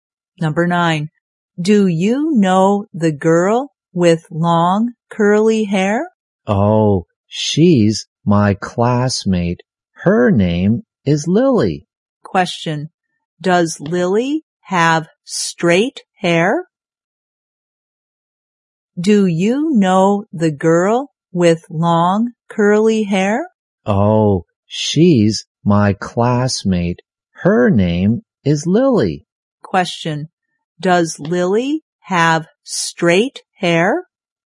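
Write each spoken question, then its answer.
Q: Does Lily have straight hair?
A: No, she has long curly hair.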